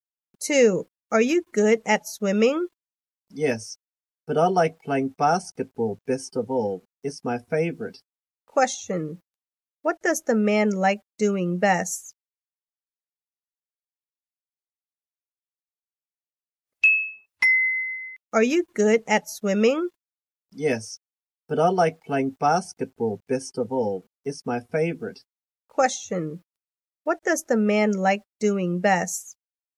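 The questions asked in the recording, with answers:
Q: Question, what does the man like doing best?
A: Playing basketball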